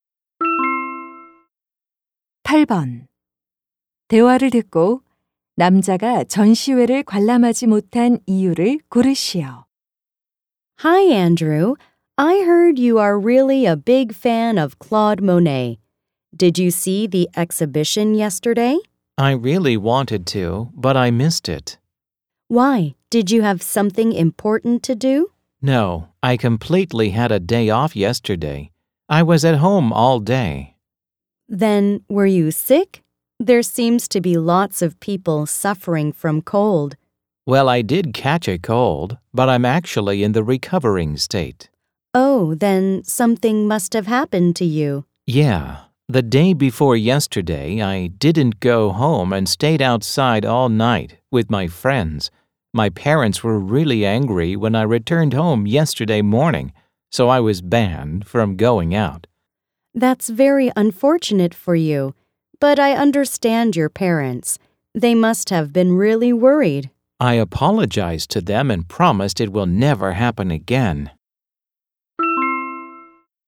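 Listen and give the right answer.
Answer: 밤새 외박해서 부모님께 외출 금지를 당해서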